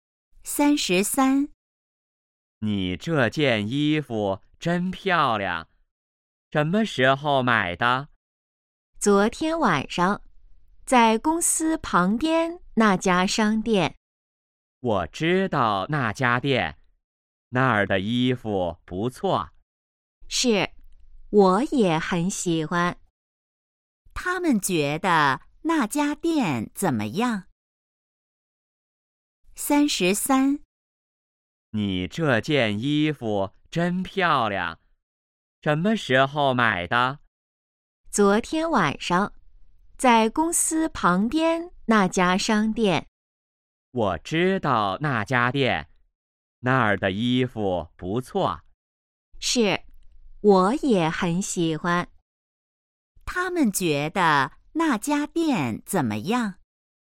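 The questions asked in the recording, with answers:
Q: 他们觉得那家店怎么样?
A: 衣服不错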